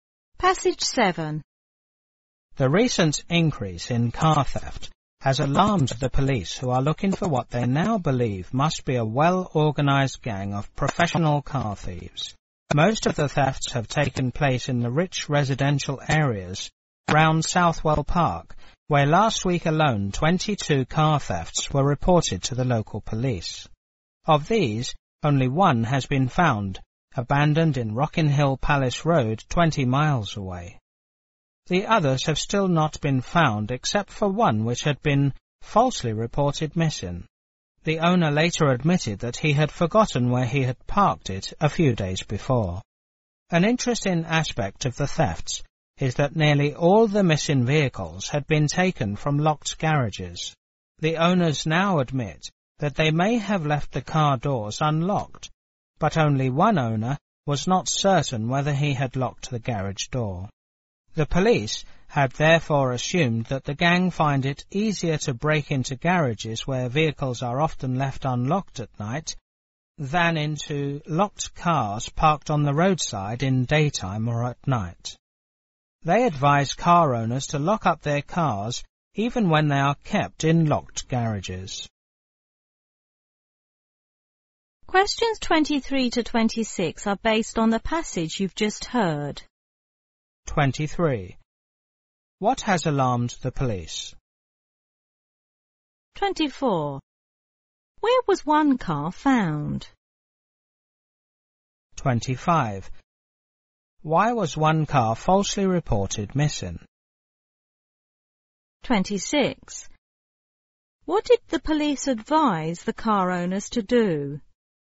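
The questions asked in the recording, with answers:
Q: What has alarmed the police?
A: The recent increase in car theft

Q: Where was one car found?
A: Abandoned in Rockin' Hill Palace Road, 20 miles away

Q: Why was one car falsely reported missing?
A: The owner had forgotten where he had parked it

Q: What did the police advise the car owners to do?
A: Lock their cars even when kept in locked garages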